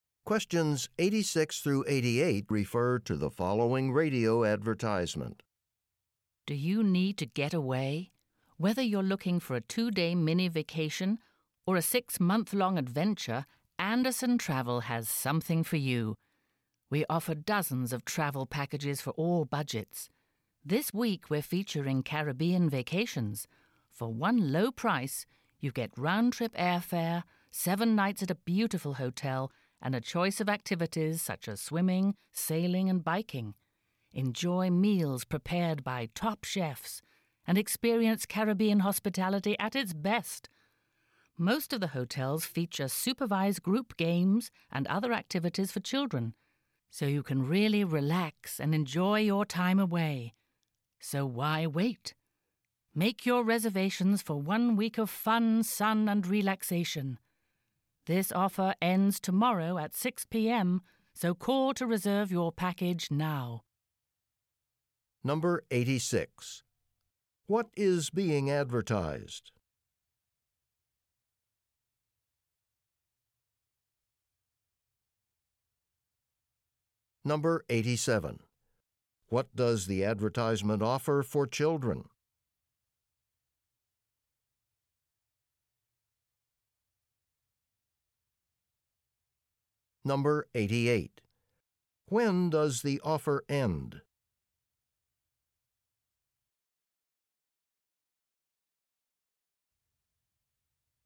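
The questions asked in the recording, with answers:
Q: What is being advertised?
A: Travel packages (Caribbean vacations)

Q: What does the advertisement offer for children?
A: Supervised group games and activities

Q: When does the offer end?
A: Tomorrow at 6 p.m.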